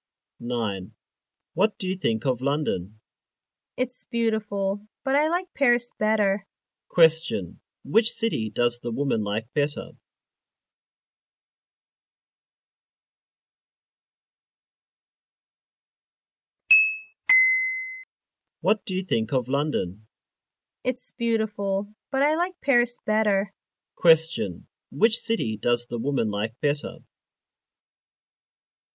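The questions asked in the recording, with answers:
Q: Question, which city does the woman like better?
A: Paris.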